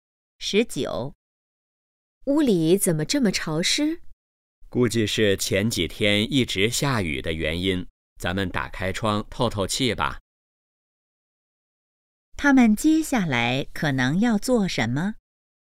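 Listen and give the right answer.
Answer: 开窗透气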